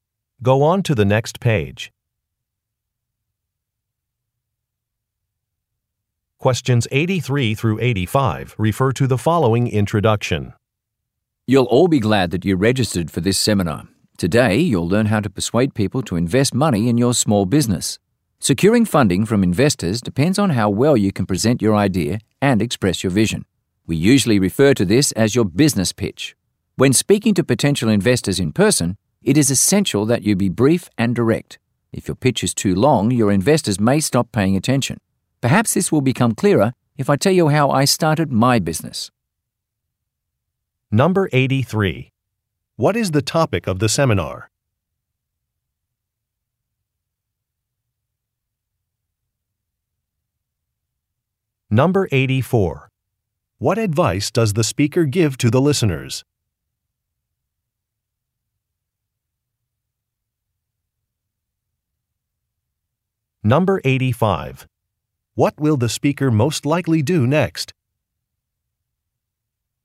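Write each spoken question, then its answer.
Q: What is the topic of the seminar?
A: Persuading investors to fund a small business

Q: What advice does the speaker give to the listeners?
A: Be brief and direct

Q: What will the speaker most likely do next?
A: Tell how he started his business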